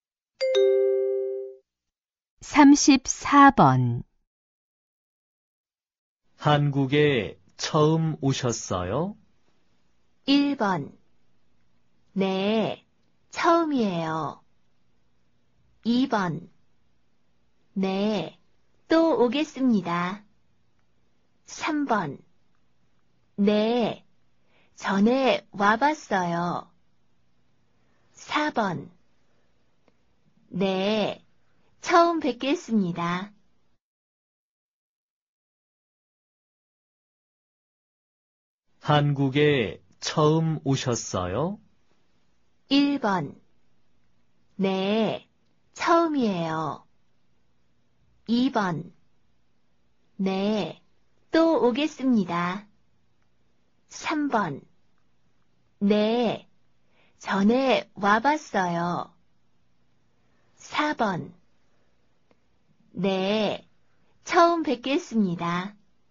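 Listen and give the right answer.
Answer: 1: 네, 처음이에요.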